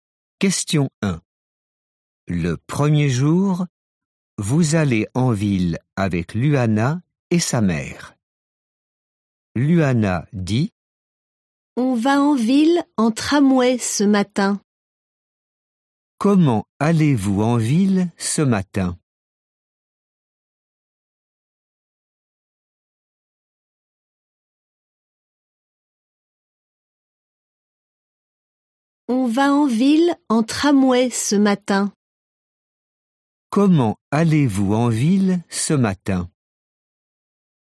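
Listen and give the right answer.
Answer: En tramway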